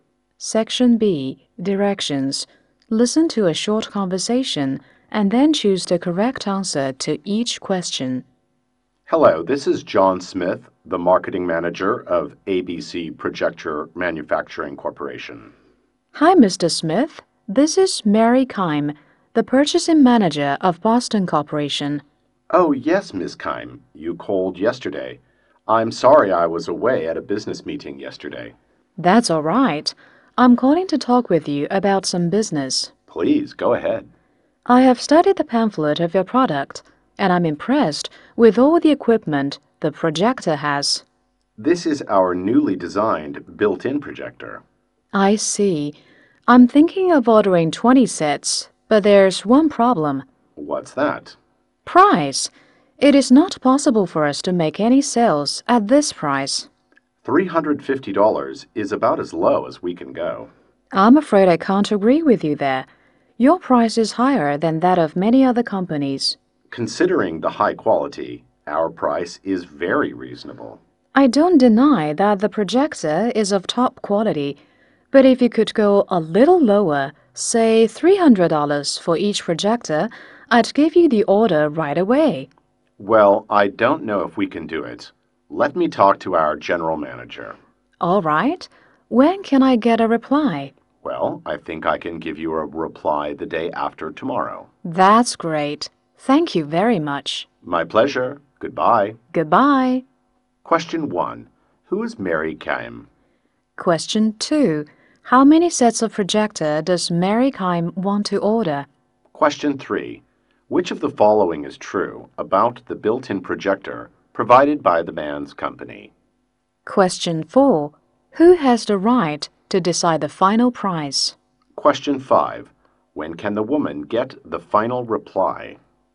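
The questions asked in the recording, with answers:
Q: Who is Mary Keim?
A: The purchasing manager of Boston Corporation

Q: How many sets of projector does Mary Keim want to order?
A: 20 sets

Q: Who has the right to decide the final price?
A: The general manager

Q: When can the woman get the final reply?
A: The day after tomorrow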